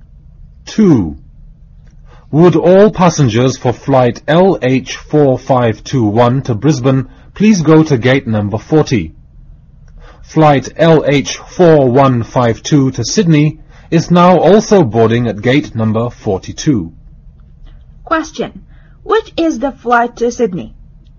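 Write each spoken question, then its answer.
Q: Which is the flight to Sydney?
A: LH4152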